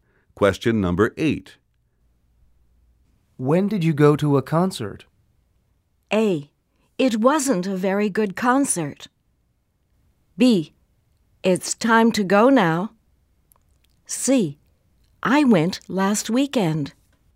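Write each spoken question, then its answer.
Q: When did you go to a concert?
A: C: I went last weekend.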